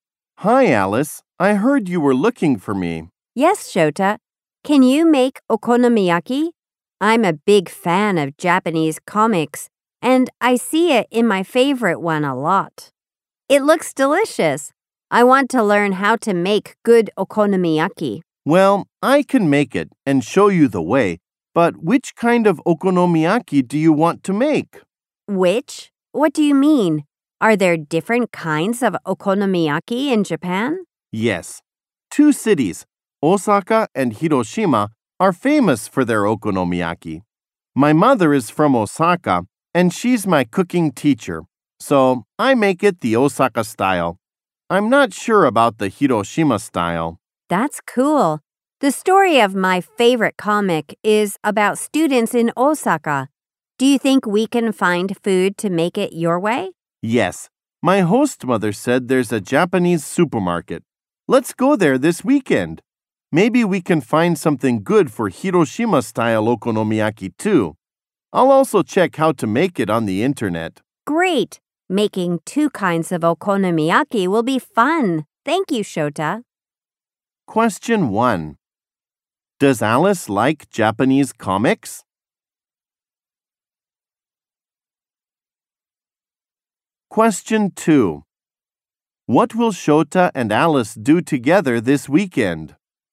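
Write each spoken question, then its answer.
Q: Does Alice like Japanese comics?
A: Yes, she does.

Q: What will Shota and Alice do together this weekend?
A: They will go to a Japanese supermarket.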